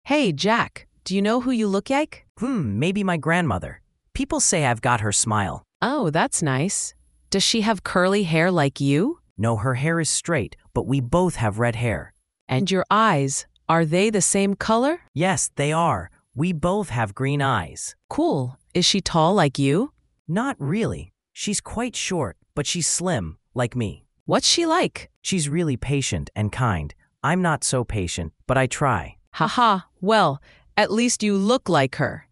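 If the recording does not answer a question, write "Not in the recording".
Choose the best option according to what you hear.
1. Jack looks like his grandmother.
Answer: True

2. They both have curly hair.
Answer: False

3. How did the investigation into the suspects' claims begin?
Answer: Not in the recording

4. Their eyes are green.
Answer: True

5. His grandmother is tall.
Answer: False

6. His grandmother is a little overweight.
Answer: False

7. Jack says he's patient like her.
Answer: False

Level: A1/A2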